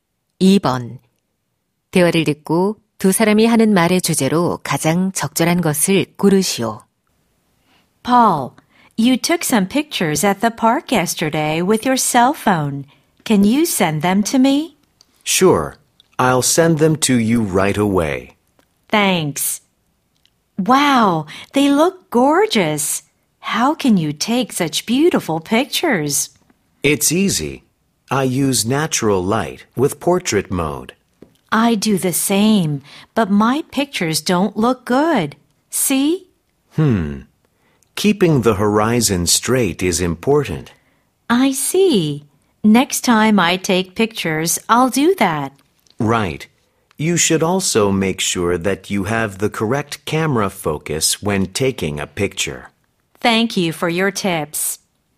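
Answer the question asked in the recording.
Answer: 사진을 잘 찍는 방법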